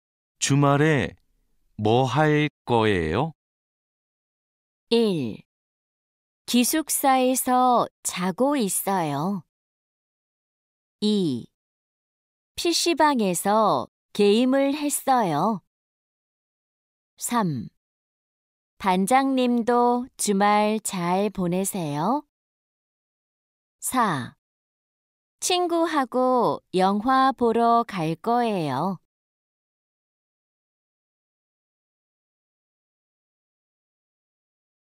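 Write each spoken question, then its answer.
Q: 주말에 뭐 할 거예요?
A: 4: 친구하고 영화 보러 갈 거예요.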